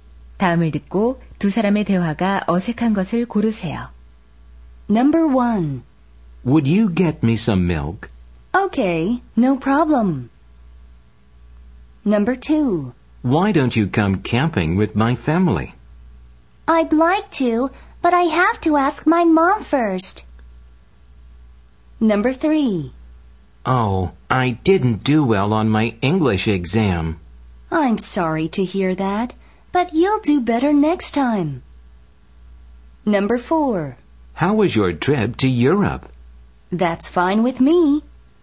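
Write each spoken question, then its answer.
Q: 다음을 듣고 두 사람의 대화가 어색한 것을 고르세요.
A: 4: How was your trip to Europe? / That's fine with me.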